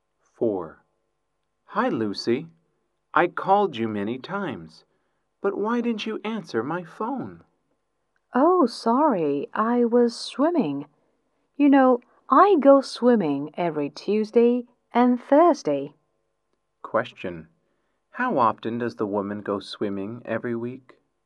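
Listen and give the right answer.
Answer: Twice a week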